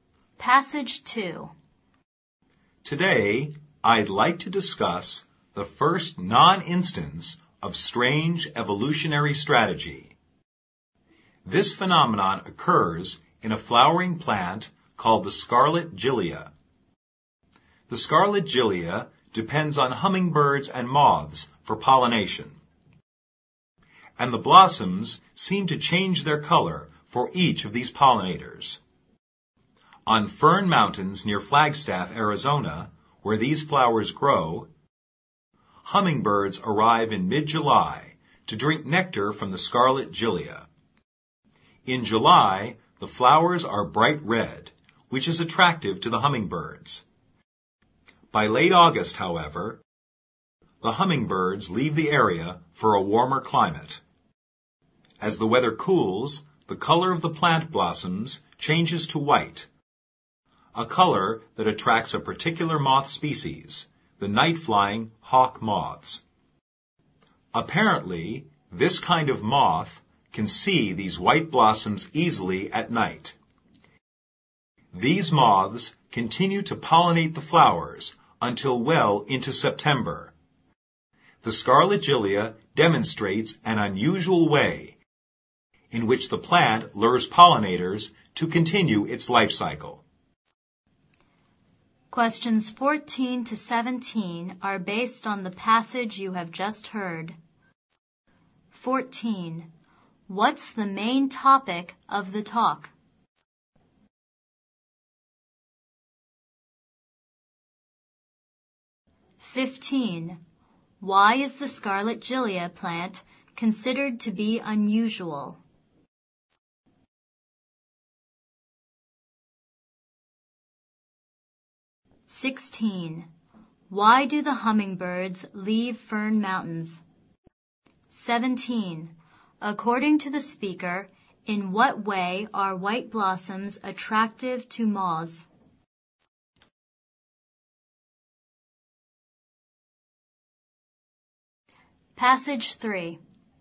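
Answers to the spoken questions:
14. How the scarlet gilia changes its color to attract different pollinators
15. Its blossoms change color to attract different pollinators
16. They go to a warmer climate
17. The moths can see them easily at night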